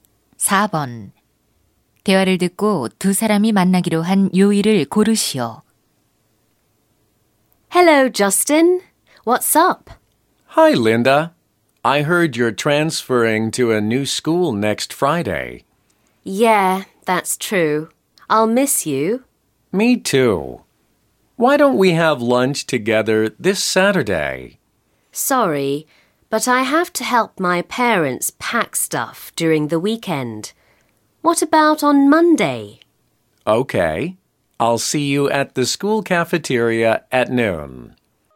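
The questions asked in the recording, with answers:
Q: 대화를 듣고 두 사람이 만나기로 한 요일을 고르시오.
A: 월요일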